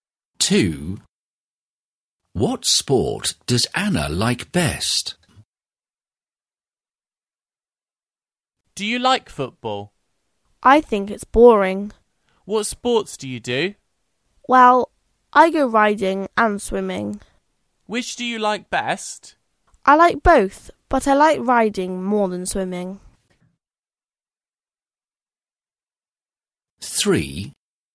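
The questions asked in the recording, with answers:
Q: What sport does Anna like best?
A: Riding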